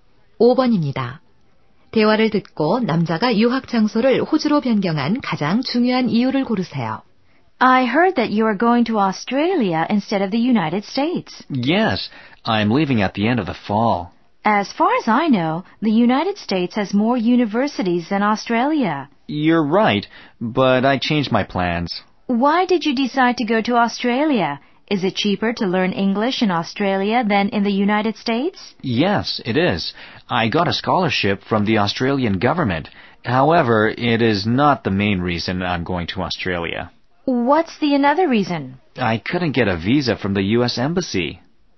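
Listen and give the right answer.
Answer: 미국 비자를 받지 못해서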